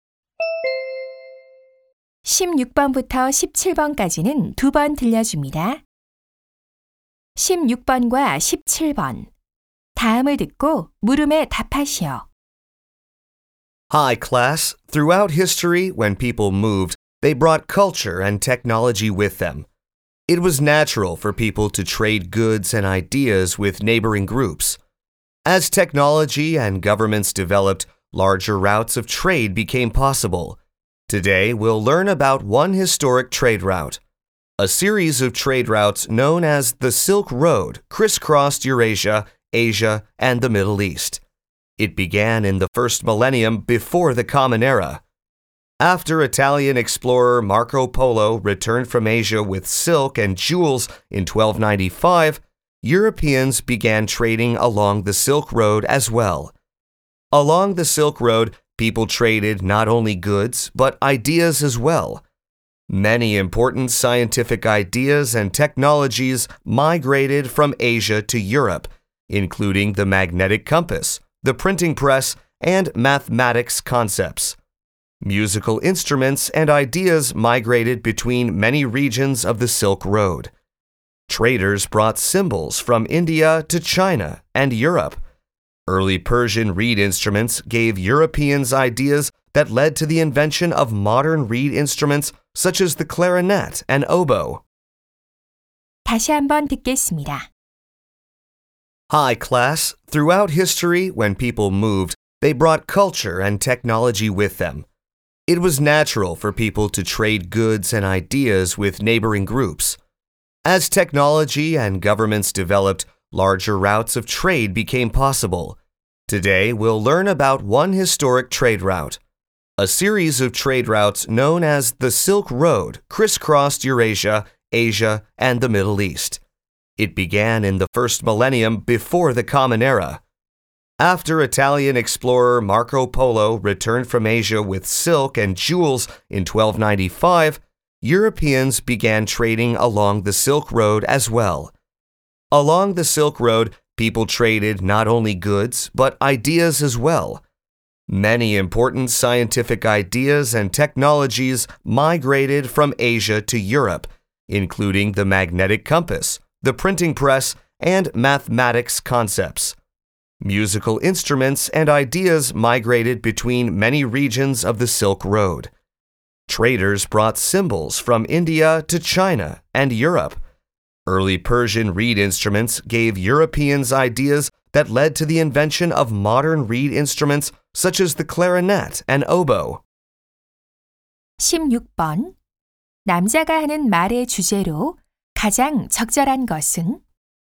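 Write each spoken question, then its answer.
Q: 남자가 하는 말의 주제로 가장 적절한 것은?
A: 실크로드를 통한 물품과 사상·문화의 교류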